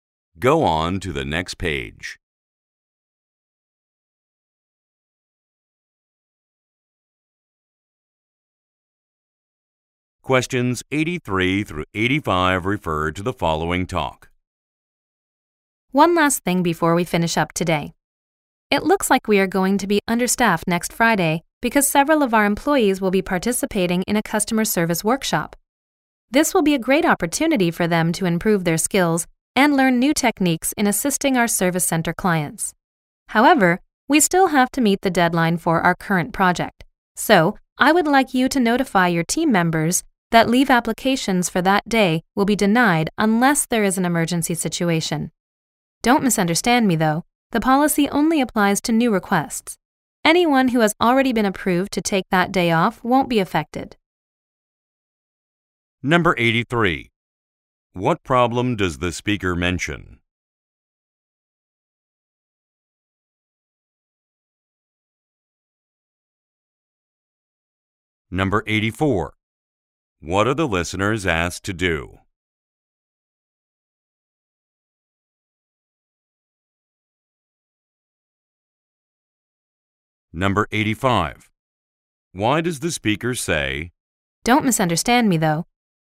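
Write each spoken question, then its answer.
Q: What problem does the speaker mention?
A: They will be understaffed next Friday

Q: What are the listeners asked to do?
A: Notify their team members about the leave policy

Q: Why does the speaker say,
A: To clarify that already-approved leave is not affected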